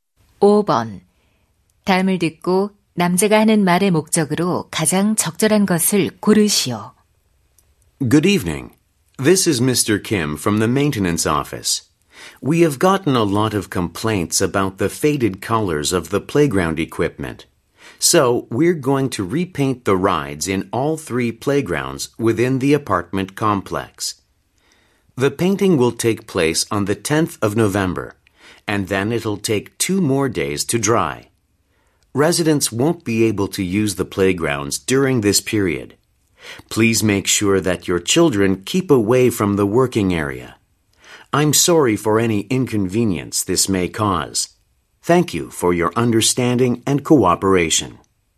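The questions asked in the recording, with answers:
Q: 다음을 듣고 남자가 하는 말의 목적으로 가장 적절한 것을 고르시오.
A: 놀이터 기구 재도색 및 이용 제한 안내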